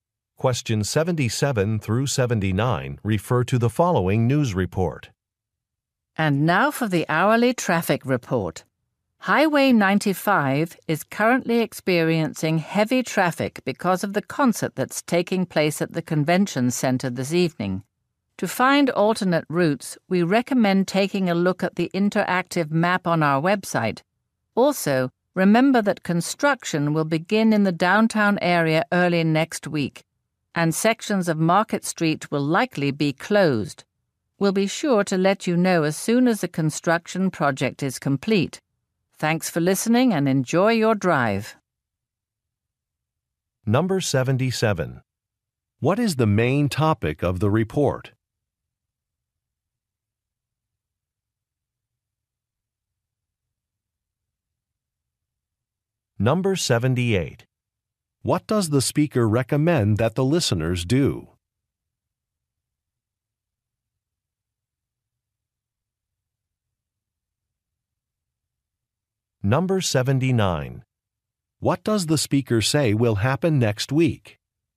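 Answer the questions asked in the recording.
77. Traffic
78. Look at the interactive map on the website
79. Construction will begin downtown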